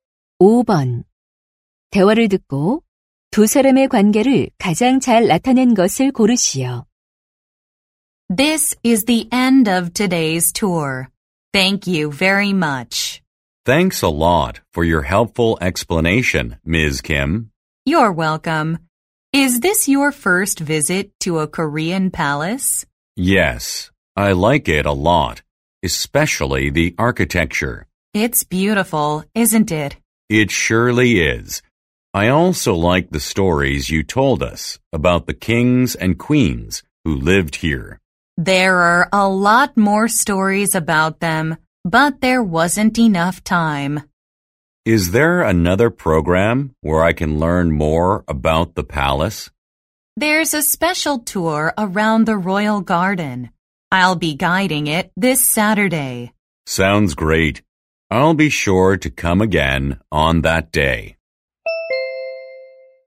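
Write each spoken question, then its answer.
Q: 대화를 듣고 두 사람의 관계를 가장 잘 나타낸 것을 고르시오.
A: 고궁 관광 가이드 - 관광객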